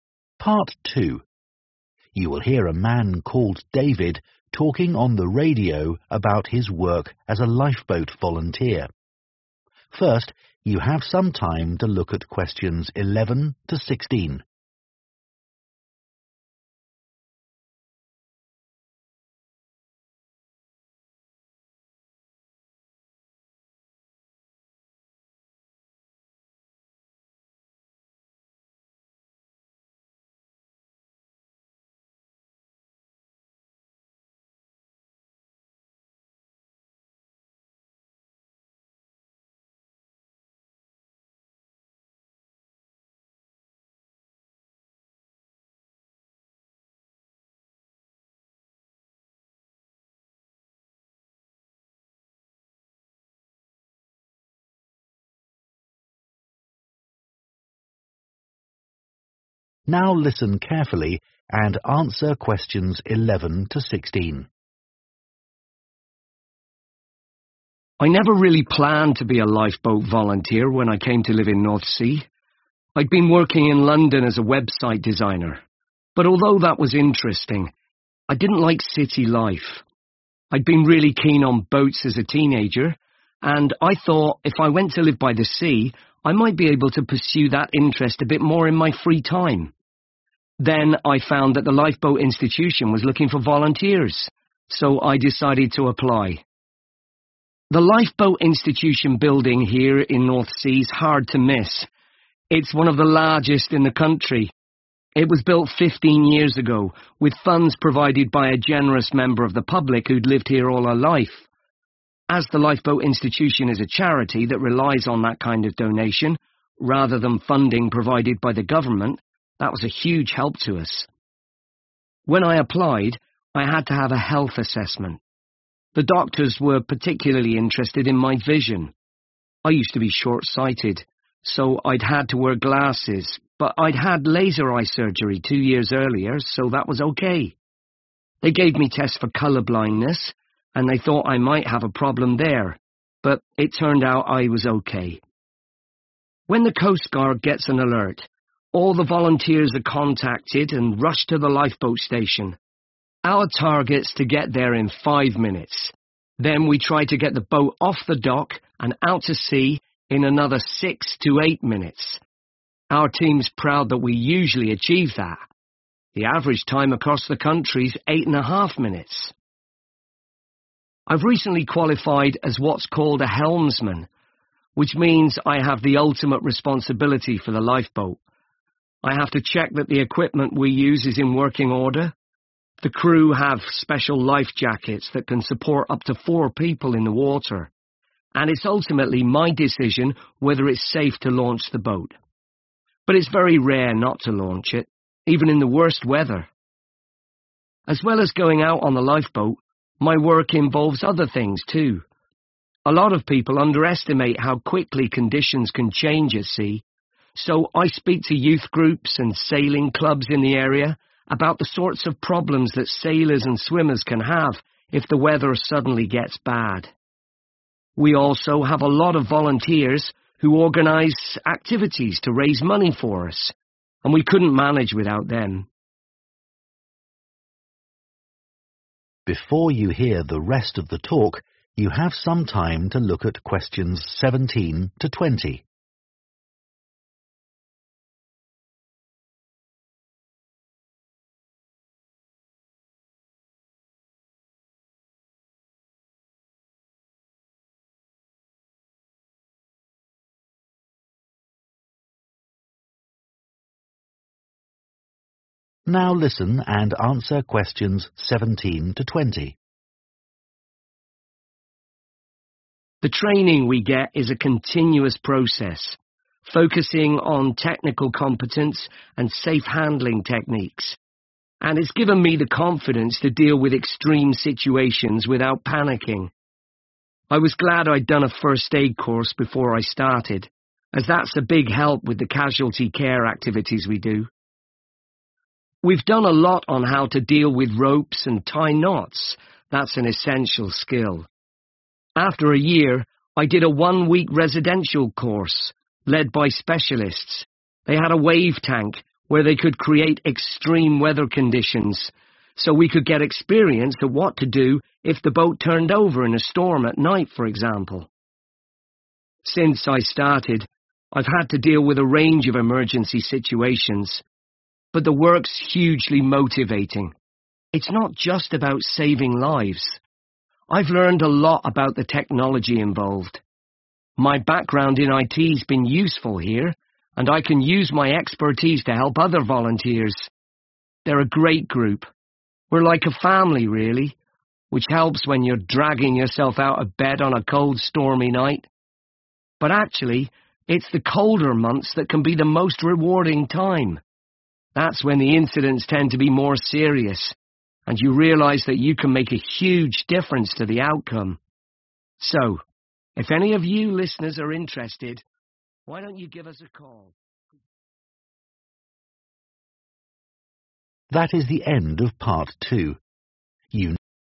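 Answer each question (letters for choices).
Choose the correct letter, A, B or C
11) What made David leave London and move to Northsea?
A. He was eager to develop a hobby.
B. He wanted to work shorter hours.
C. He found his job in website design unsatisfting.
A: A

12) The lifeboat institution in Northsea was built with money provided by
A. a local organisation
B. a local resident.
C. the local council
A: B

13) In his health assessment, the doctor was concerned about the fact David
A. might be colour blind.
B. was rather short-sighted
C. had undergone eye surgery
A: A

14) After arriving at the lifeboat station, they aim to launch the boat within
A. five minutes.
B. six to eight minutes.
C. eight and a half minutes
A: B

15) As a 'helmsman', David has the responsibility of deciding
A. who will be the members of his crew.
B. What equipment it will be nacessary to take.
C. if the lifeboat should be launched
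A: C

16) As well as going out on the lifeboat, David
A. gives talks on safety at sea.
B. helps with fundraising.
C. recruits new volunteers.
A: A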